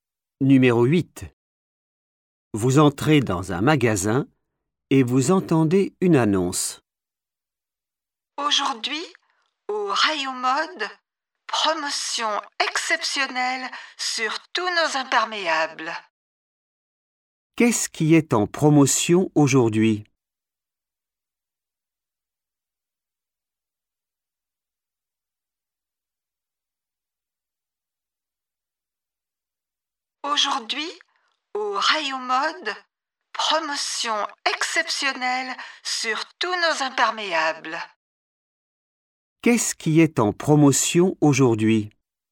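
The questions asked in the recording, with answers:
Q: Qu'est-ce qui est en promotion aujourd'hui?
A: les imperméables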